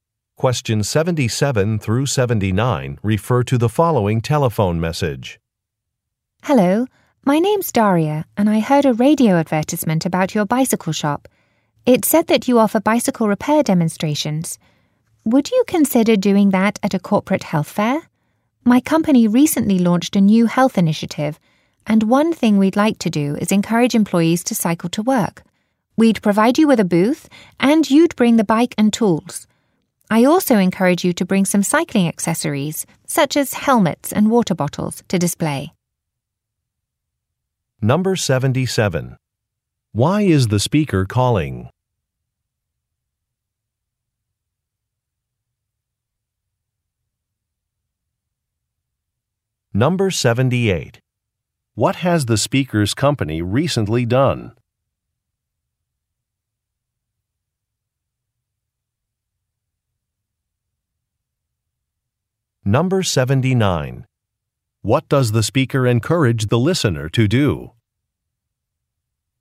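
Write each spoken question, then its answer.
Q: Why is the speaker calling?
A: To ask the shop to give a bicycle repair demonstration at a corporate health fair

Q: What has the speaker's company recently done?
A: Launched a new health initiative

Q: What does the speaker encourage the listener to do?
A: Bring cycling accessories, such as helmets and water bottles, to display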